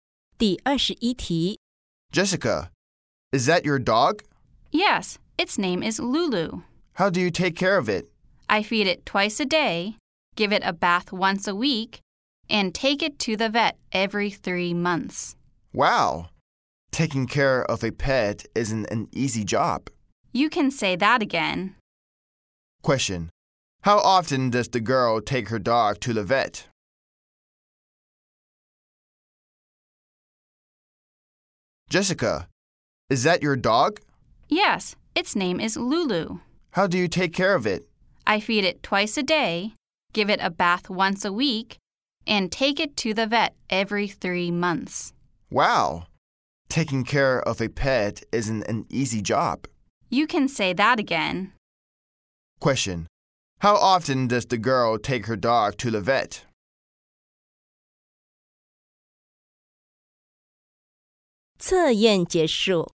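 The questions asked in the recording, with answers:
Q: How often does the girl take her dog to the vet?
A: Every 3 months.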